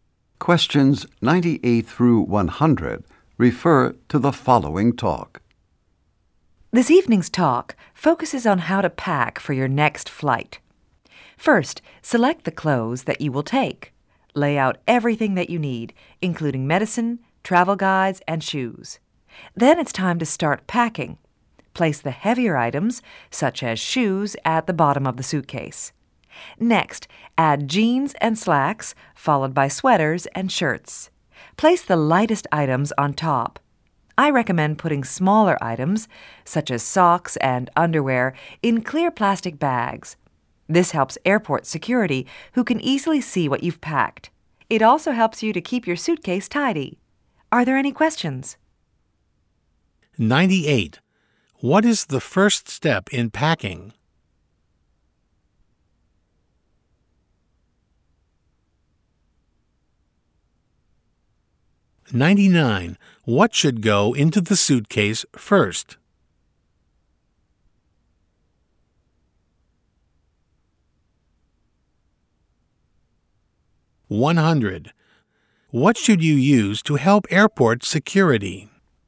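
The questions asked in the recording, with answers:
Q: What is the first step in packing?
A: Select the clothes you will take

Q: What should go into the suitcase first?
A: Heavier items, such as shoes

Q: What should you use to help airport security?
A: Clear plastic bags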